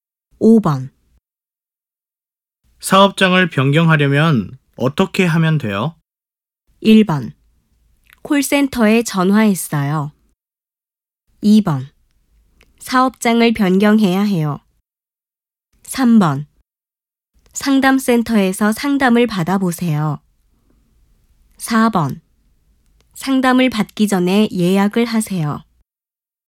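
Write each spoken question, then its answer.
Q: 사업장을 변경하려면 어떻게 하면 돼요?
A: 3: 상담센터에서 상담을 받아보세요.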